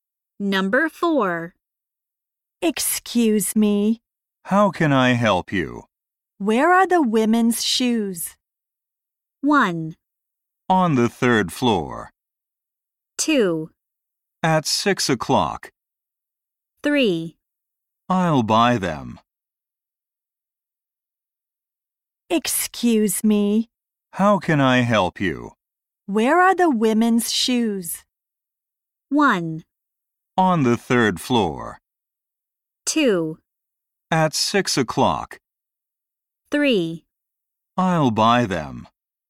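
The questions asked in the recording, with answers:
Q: Where are the women's shoes?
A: 1: On the third floor.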